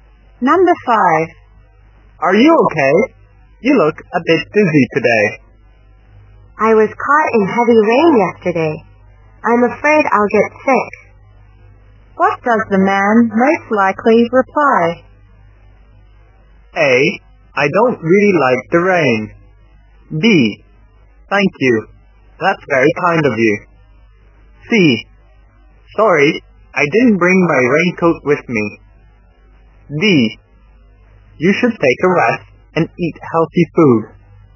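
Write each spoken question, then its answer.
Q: What does the man most likely reply?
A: D: You should take a rest and eat healthy food.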